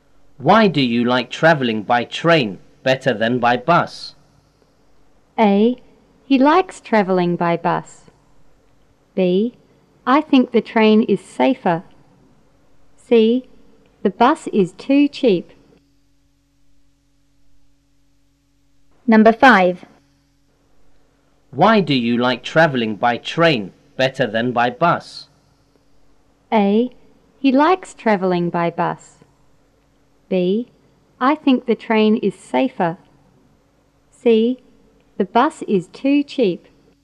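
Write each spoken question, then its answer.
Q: Why do you like travelling by train better than by bus?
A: B: I think the train is safer.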